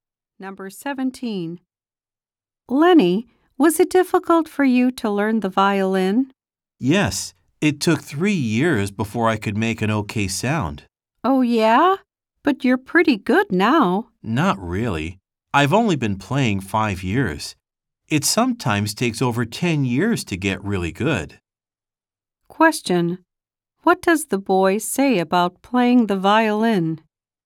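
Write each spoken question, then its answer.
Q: What does the boy say about playing the violin?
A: It took him 3 years to make an okay sound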